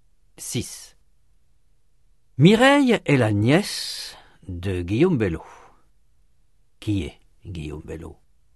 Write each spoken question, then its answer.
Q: Qui est Guillaume Bello?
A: L'oncle de Mireille.